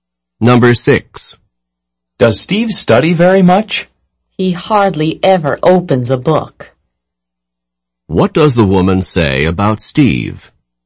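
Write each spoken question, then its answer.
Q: What does the woman say about Steve?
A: He almost never studies.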